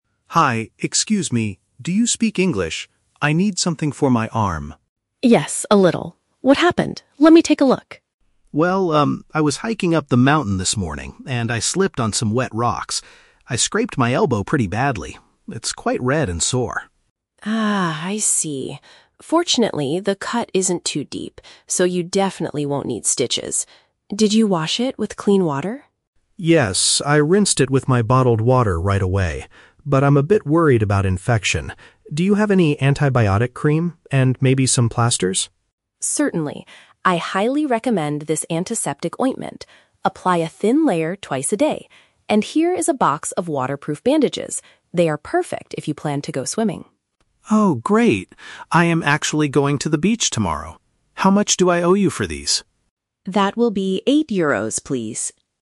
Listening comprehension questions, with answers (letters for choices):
Listen to the conversation between a tourist and a pharmacist. Choose the correct answer (A, B, or C) for each question.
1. How did the man injure himself?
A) He was bitten by a dangerous insect in the forest.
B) He lost his balance and fell during a walk.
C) He hit his leg on a rock while swimming at the beach.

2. What is the tourist concerned about?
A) Having to go to the hospital for stitches.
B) Running out of clean drinking water for his trip.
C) The wound getting worse from bacteria.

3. Why are the bandages a good choice for the man?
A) They will keep the injury dry when he goes to the sea.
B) They already have the antibiotic medicine inside them.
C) They are the cheapest option available in the pharmacy.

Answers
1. B
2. C
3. A

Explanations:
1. The tourist says he was "hiking" (a walk) and "slipped" (lost his balance) on some wet rocks. Why the trap is wrong: Option (C) is a strong trap because the audio mentions "rocks" and the "beach". However, he injured his elbow (not his leg), and he is going to the beach tomorrow, not when the accident happened. Option (A) is a plausible travel problem but is never mentioned.
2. The tourist says, "I'm a bit worried about infection." An infection happens when bacteria enter a wound and make it worse. Why the trap is wrong: Option (A) is the main trap. The word "stitches" is in the audio, but the pharmacist explicitly says the cut is not deep so he "won't need stitches." Option (B) is a trap because he mentions "bottled water", but he used it to clean the cut, not because he is running out of it.
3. The pharmacist gives him "waterproof" bandages because he is going to the "beach", which means they will protect the cut in the water. Why the trap is wrong: Option (B) is the trap. The audio mentions "antibiotic cream" (antiseptic ointment) and bandages, but they are two separate products. The medicine is not already inside the bandages. Option (C) is not mentioned.

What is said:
Tourist: Hi, excuse me. Do you speak English? I need something for my arm.
Pharmacist: Yes, a little. What happened? Let me take a look.
Tourist: Well, um, I was hiking up the mountain this morning, and I slipped on some wet rocks. I scraped my elbow pretty badly. It's quite red and sore.
Pharmacist: Ah, I see. Fortunately, the cut isn't too deep, so you definitely won't need stitches. Did you wash it with clean water?
Tourist: Yes, I rinsed it with my bottled water right away. But I'm a bit worried about infection. Do you have any antibiotic cream? And maybe some plasters?
Pharmacist: Certainly. I highly recommend this antiseptic ointment. Apply a thin layer twice a day. And here is a box of waterproof bandages. They are perfect if you plan to go swimming.
Tourist: Oh, great. I am actually going to the beach tomorrow. How much do I owe you for these?